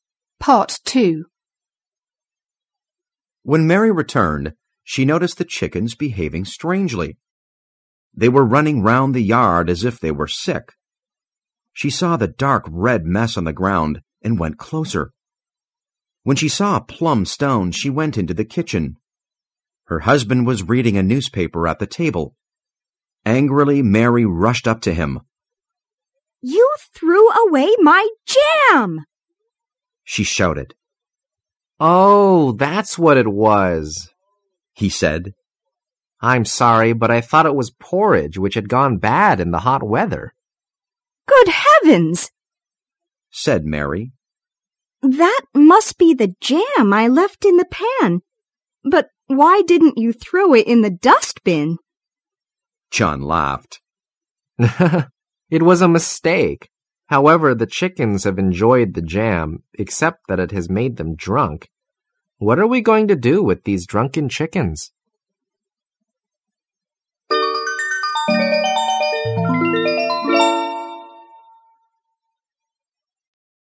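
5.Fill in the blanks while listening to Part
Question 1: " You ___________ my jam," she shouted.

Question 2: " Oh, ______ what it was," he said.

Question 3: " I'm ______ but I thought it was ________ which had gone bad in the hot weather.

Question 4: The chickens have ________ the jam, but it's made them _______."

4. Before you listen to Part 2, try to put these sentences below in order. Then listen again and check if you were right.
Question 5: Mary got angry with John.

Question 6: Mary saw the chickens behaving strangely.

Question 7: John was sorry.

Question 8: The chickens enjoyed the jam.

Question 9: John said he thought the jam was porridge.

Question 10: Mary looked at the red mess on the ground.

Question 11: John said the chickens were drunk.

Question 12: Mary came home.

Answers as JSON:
{"1": "threw away", "2": "that's", "3": "sorry; porridge", "4": "enjoyed; drunk", "5": "4", "6": "2", "7": "5", "8": "7", "9": "6", "10": "3", "11": "8", "12": "1"}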